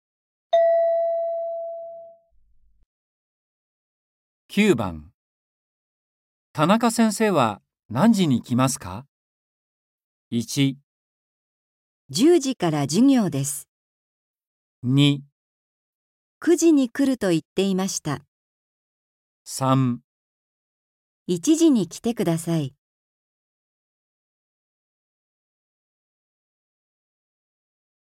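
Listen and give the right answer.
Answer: 2

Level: N4.36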